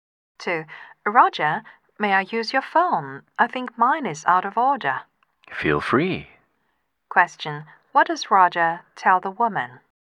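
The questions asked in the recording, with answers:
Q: What does Roger tell the woman?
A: She can use his phone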